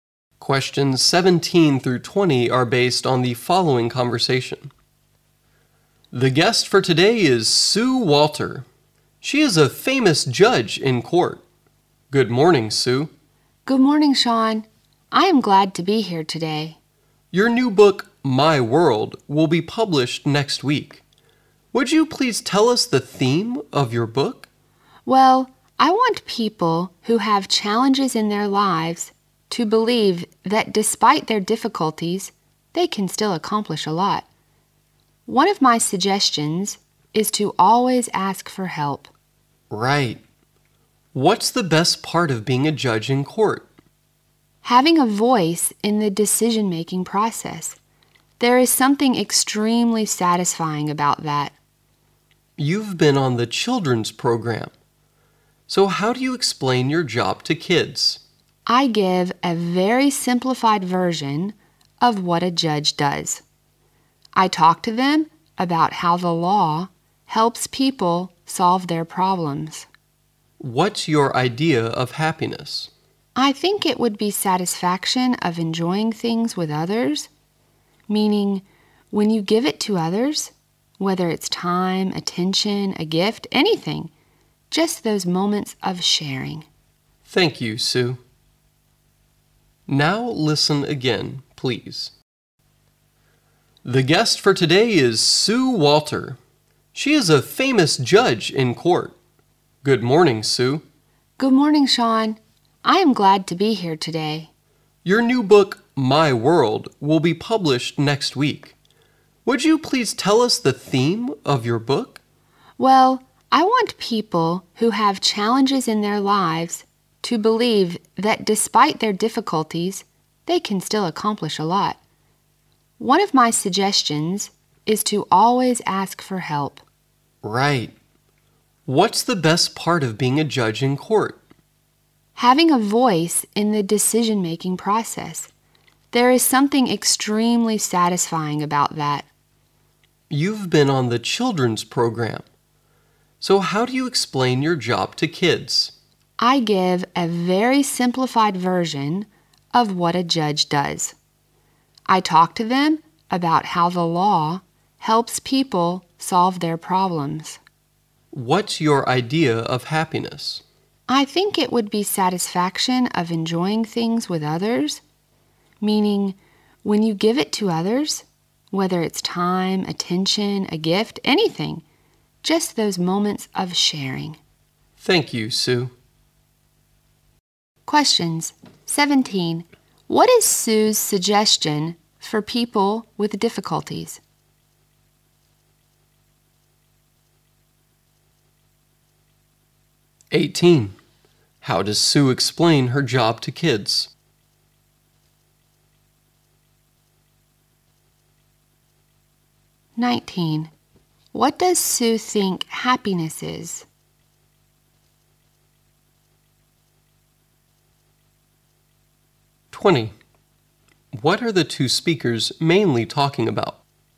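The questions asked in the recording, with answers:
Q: What is Sue's suggestion for people with difficulties?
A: Always ask for help

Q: How does Sue explain her job to kids?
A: She tells them how the law helps people solve their problems

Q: What does Sue think happiness is?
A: Enjoying things with others; moments of sharing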